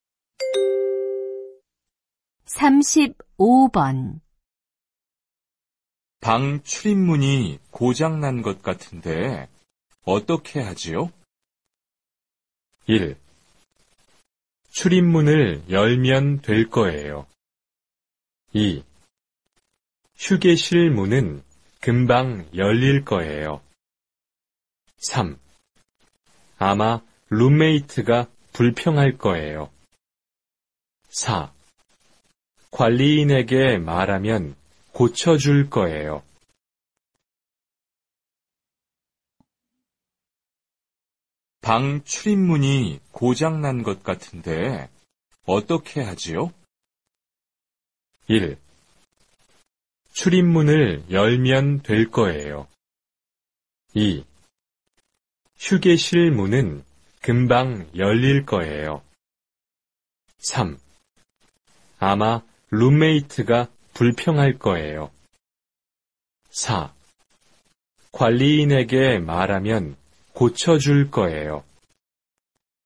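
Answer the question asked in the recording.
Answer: 4: 관리인에게 말하면 고쳐줄 거예요.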